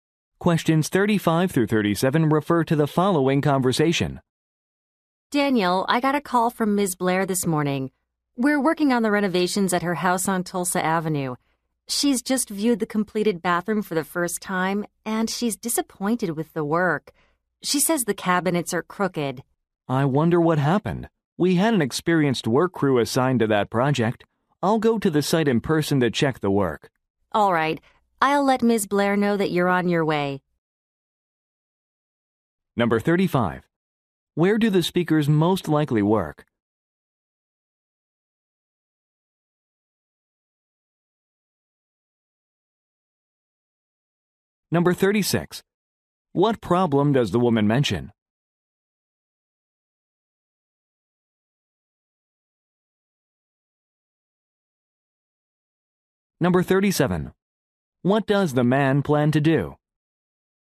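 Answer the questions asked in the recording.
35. At a home renovation company
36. A client is unhappy because the cabinets are crooked
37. Go to the site to check the work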